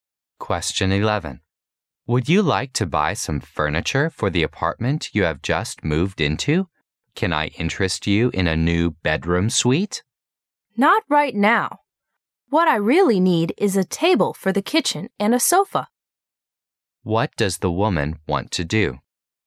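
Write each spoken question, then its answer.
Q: What does the woman want to do?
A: Buy a kitchen table and a sofa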